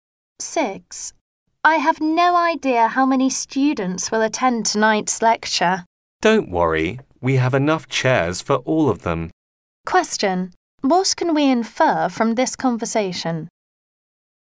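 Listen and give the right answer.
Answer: There are enough chairs for all the students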